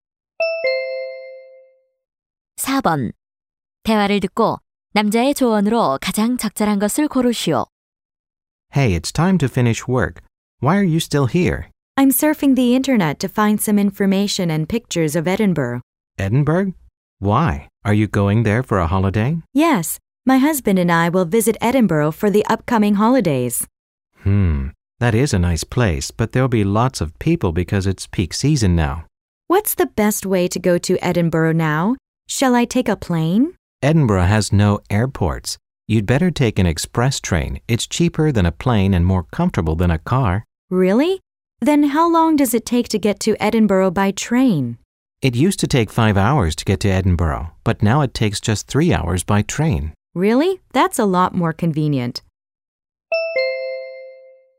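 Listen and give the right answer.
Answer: 급행열차를 타라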